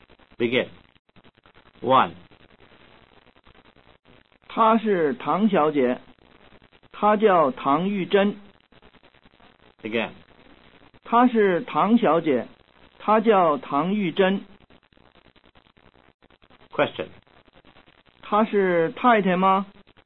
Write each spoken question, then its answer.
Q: 她是太太吗?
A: 她不是太太,她是小姐.